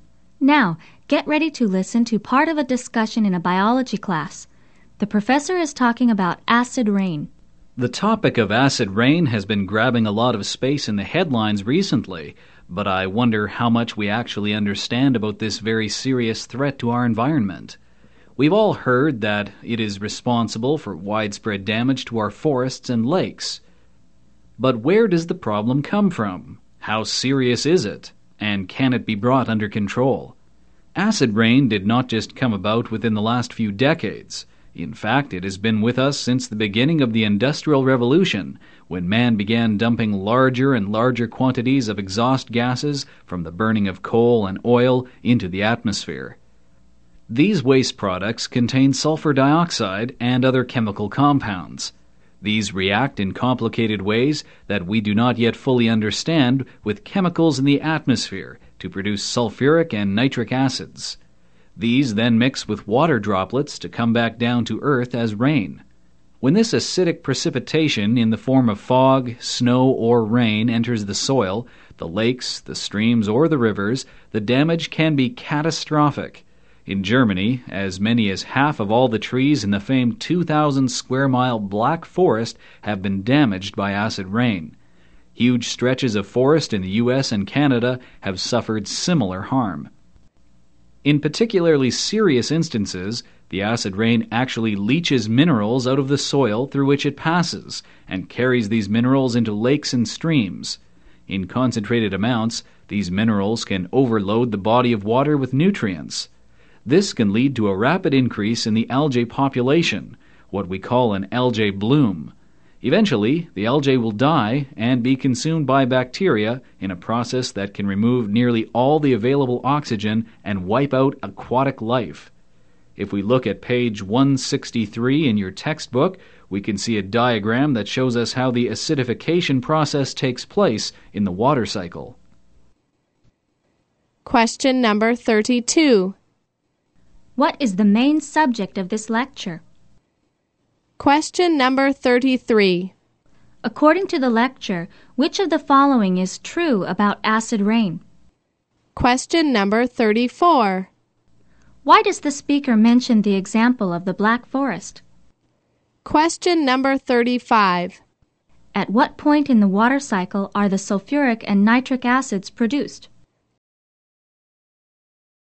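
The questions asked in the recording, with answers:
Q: What is the main subject of this lecture?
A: Acid rain: where it comes from and the damage it does to the environment

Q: Why does the speaker mention the example of the Black Forest?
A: To show how much damage acid rain can do to forests

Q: At what point in the water cycle are the sulfuric and nitric acids produced?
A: In the atmosphere, before they mix with water droplets and fall as rain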